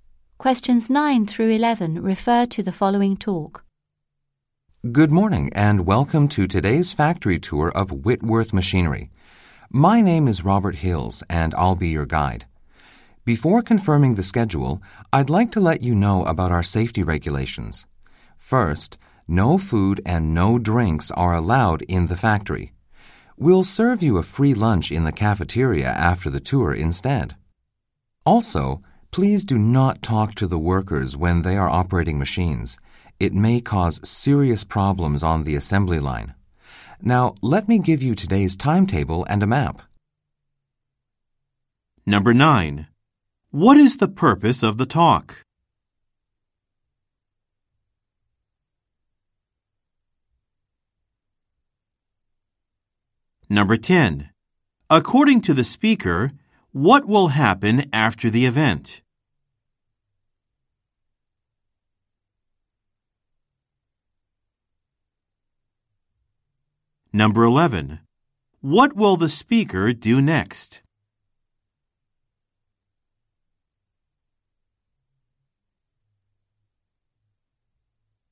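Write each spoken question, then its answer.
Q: According to the speaker, what will happen after the event?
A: A free lunch will be served in the cafeteria

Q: What will the speaker do next?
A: Hand out the day's timetable and a map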